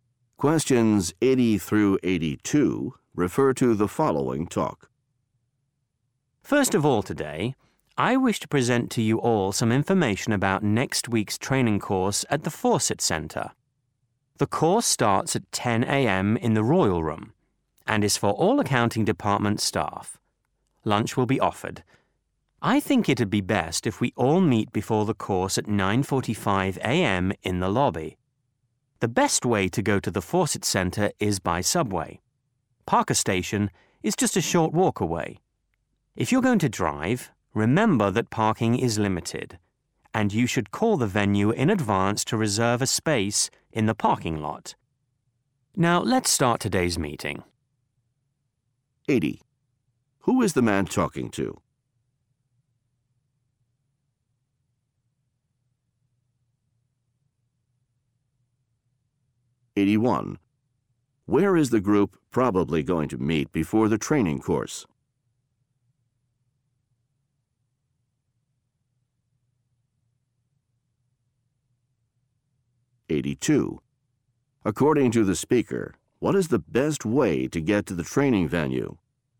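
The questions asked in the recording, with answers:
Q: Who is the man talking to?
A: Accounting department staff

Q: Where is the group probably going to meet before the training course?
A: In the lobby

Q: According to the speaker, what is the best way to get to the training venue?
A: By subway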